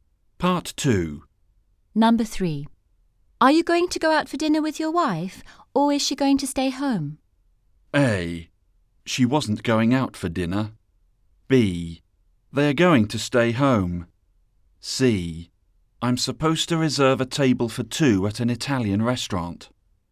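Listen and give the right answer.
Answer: C: I'm supposed to reserve a table for two at an Italian restaurant.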